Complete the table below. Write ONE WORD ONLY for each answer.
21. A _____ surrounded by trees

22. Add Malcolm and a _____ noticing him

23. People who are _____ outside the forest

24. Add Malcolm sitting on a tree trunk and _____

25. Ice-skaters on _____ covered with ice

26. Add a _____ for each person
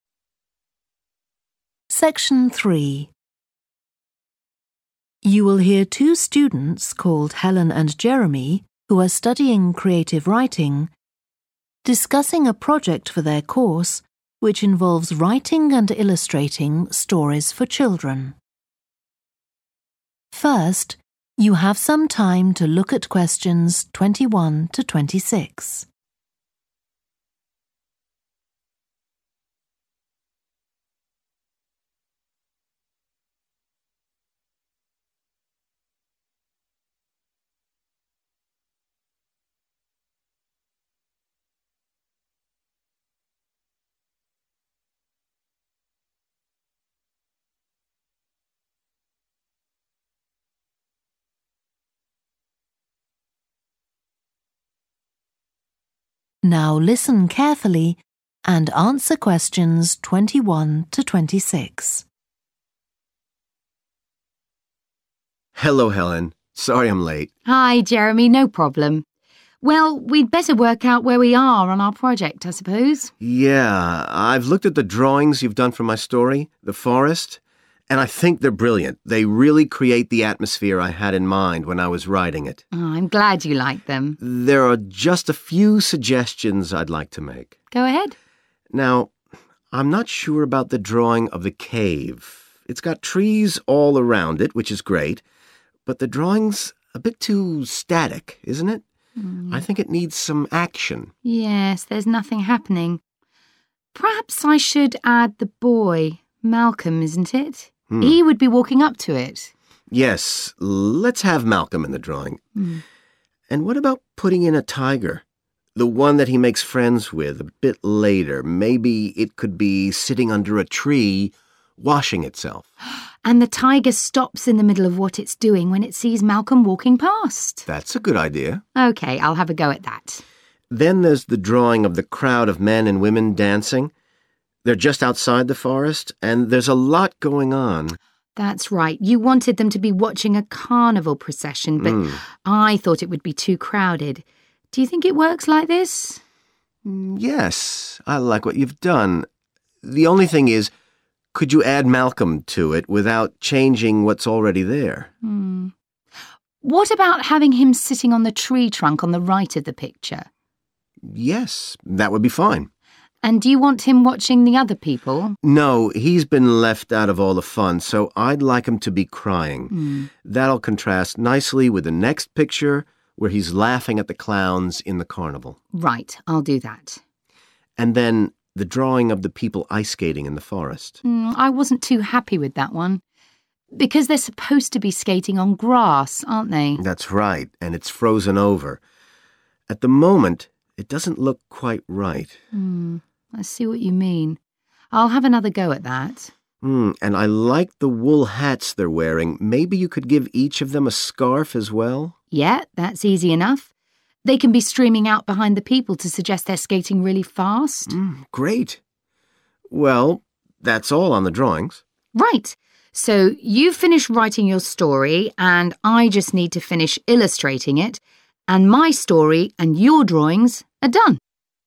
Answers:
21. cave
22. tiger
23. dancing
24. crying
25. grass
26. scarf

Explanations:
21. The correct answer 'cave' is right because the transcript says the drawing has a cave with trees around it.
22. The correct answer aligns perfectly with the given excerpt as it directly mentions adding a tiger, which matches the implied change needed in the scenes described in the table.
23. The correct answer matches the activity mentioned in the excerpt, where men and women are engaged in dancing outside the forest.
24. The correct answer, "crying", is correct because the transcript says that the person wants Malcolm to be crying. This is the change to be made to the drawing.
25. The correct answer aligns with the idea presented in the excerpt that the ice-skaters were not supposed to be on ice but on grass. Adding ice-skaters on grass rather than ice would be the appropriate change as indicated in the excerpt.
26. The correct answer aligns with the given excerpt, which mentions adding scarves to each person. This addition would enhance the drawing by depicting the ice-skaters with scarves for warmth or style.

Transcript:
JEREMY: Hello, Helen. Sorry I'm late.
HELEN: Hi, Jeremy, no problem. Well we'd better work out where we are on our project, I suppose.
JEREMY: Yeah. I've looked at the drawings you've done for my story, 'The Forest', and I think they're brilliant – they really create the atmosphere I had in mind when I was writing it.
HELEN: I'm glad you like them.
JEREMY: There are just a few suggestions I'd like to make.
HELEN: Go ahead.
JEREMY: Now, I'm not sure about the drawing of the cave – it's got trees all around it, which is great, but the drawing's a bit too static, isn't it? I think it needs some action.
HELEN: Yes, there's nothing happening. Perhaps I should add the boy – Malcolm, isn't it? He would be walking up to it.
JEREMY: Yes, let's have Malcolm in the drawing. And what about putting in a tiger – the one that he makes friends with a bit later? Maybe it could be sitting under a tree washing itself.
HELEN: And the tiger stops in the middle of what it's doing when it sees Malcolm walking past.
JEREMY: That's a good idea.
HELEN: OK, I'll have a go at that.
JEREMY: Then there's the drawing of the crowd of men and women dancing. They're just outside the forest, and there's a lot going on.
HELEN: That's right, you wanted them to be watching a carnival procession, but I thought it would be too crowded. Do you think it works like this?
JEREMY: Yes, I like what you've done. The only thing is, could you add Malcolm to it, without changing what's already there.
HELEN: What about having him sitting on the tree trunk on the right of the picture?
JEREMY: Yes, that would be fine.
HELEN: And do you want him watching the other people?
JEREMY: No, he's been left out of all the fun, so I'd like him to be crying – that'll contrast nicely with the next picture, where he's laughing at the clowns in the carnival.
HELEN: Right, I'll do that.
JEREMY: And then the drawing of the people ice skating in the forest.
HELEN: I wasn't too happy with that one. Because they're supposed to be skating on grass aren't they?
JEREMY: That's right, and it's frozen over. At the moment it doesn't look quite right.
HELEN: Mm, I see what you mean. I'll have another go at that.
JEREMY: And I like the wool hats they're wearing. Maybe you could give each of them a scarf as well.
HELEN: Yeah, that's easy enough. They can be streaming out behind the people to suggest they're skating really fast.
JEREMY: Mm, great. Well that's all on the drawings.
HELEN: Right. So you've finished writing your story and I just need to finish illustrating it, and my story and your drawings are done.